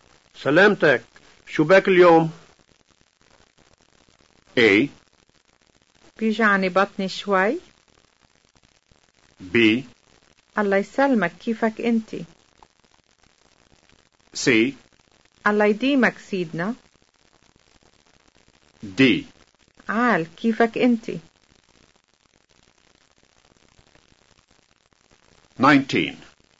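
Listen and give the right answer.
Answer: A: بيجعني بطني شوي.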